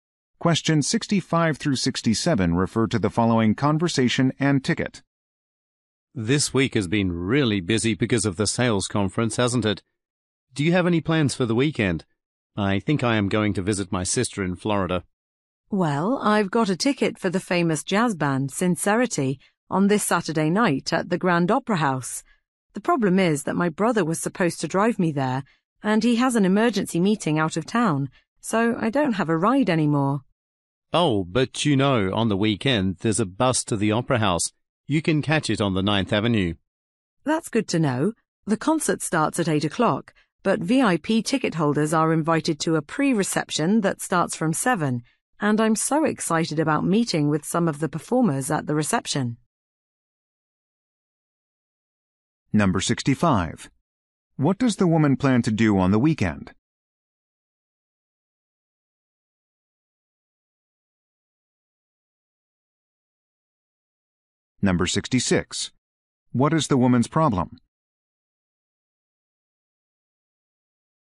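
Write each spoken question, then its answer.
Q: What is the woman's problem?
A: She has no ride to the concert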